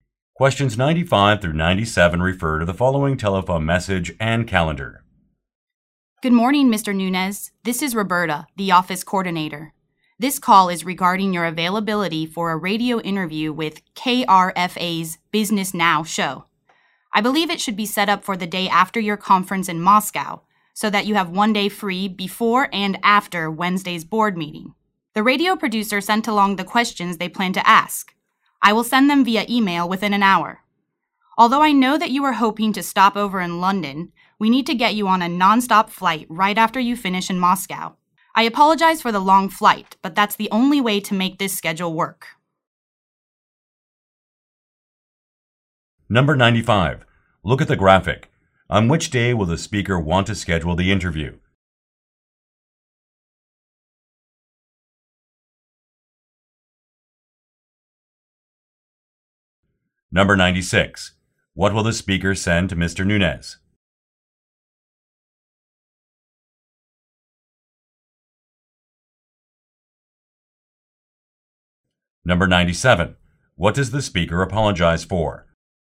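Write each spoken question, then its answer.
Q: What will the speaker send to Mr.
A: The questions for the interview

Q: What does the speaker apologize for?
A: The long flight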